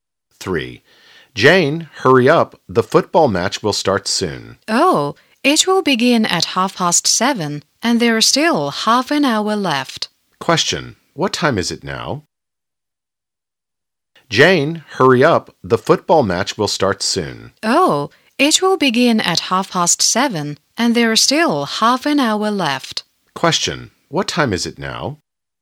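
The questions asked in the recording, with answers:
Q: What time is it now?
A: 7:00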